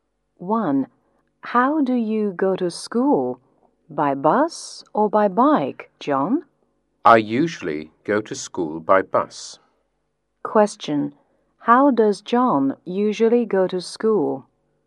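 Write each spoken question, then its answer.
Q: How does John usually go to school?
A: By bus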